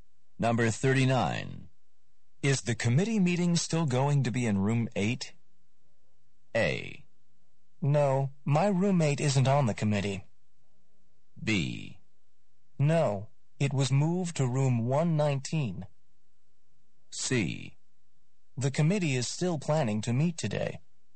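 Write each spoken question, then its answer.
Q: Is the committee meeting still going to be in room 8?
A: B: No, it was moved to room 119.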